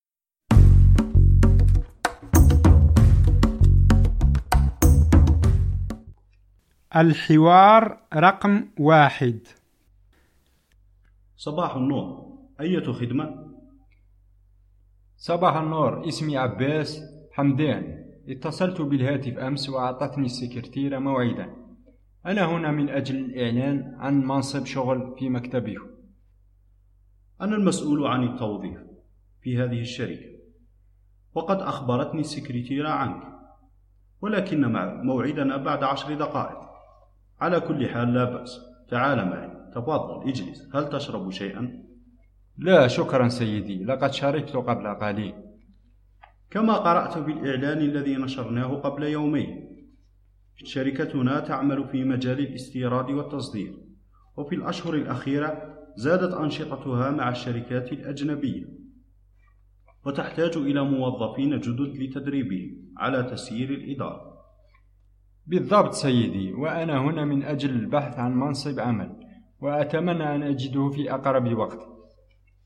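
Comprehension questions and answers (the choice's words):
استمع/ استمعي إلى الحوار ثم اختَرْ / اختاري ا الجواب الصحيح:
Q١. لماذا لم يشرب عبّاس شيئا؟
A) لأنه يكره المشروبات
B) لأنه شرب قبل أسبوع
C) لأنه شرب قبل قليل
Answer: لأنه شرب قبل قليل

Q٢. المسؤول عن التوظيف قال إنّ شركته تعمل في مجال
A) المدارس والجامعات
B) الاستيراد والتصدير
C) الرياضة والسياحة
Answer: الاستيراد والتصدير

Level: المستوى الأول الدرجة الثانية (A2)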